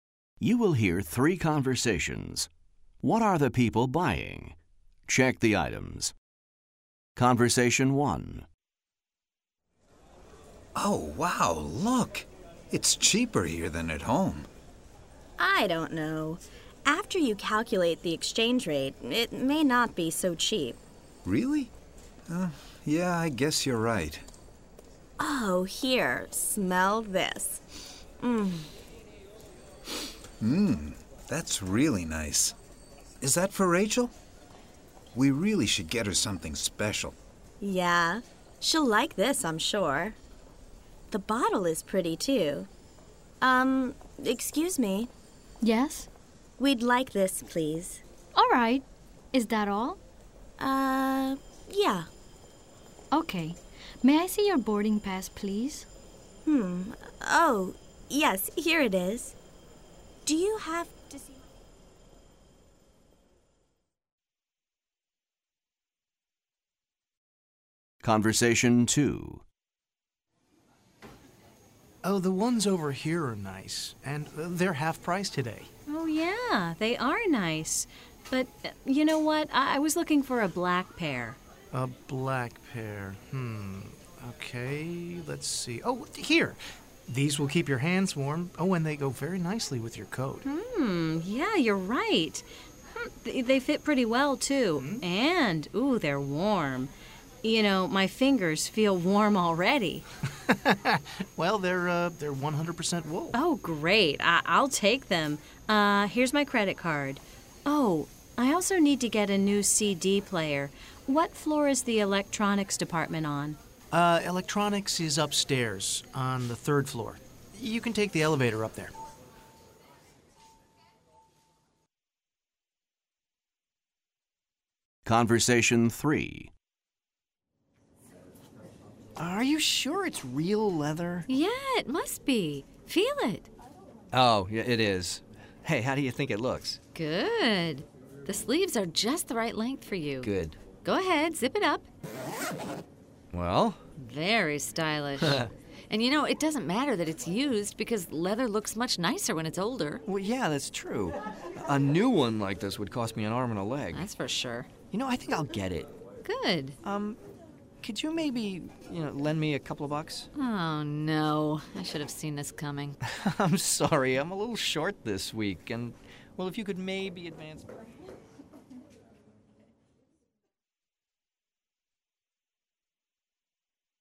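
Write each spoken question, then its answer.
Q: What are the people buying?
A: perfume

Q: What are the people buying?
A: gloves (black wool gloves)

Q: What are the people buying?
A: a used leather jacket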